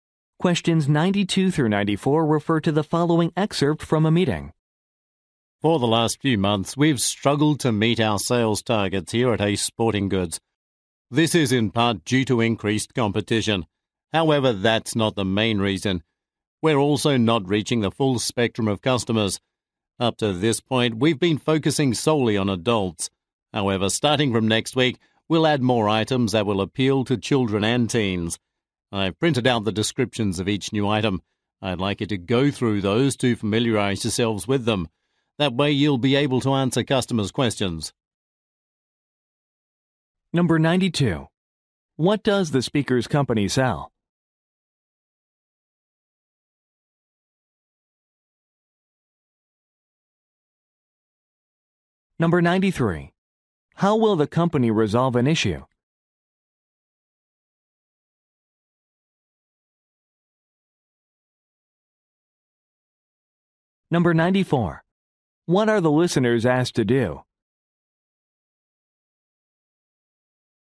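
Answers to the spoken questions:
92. Sporting goods
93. By adding items for children and teens
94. Read the descriptions of the new items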